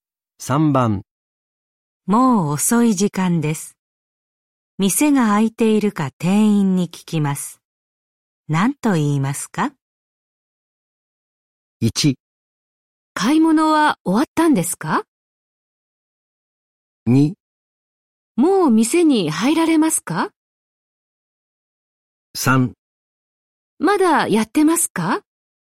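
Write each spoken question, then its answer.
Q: もう遅い時間です。店が開いているか店員に聞きます。何と言いますか?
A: 3: まだやってますか?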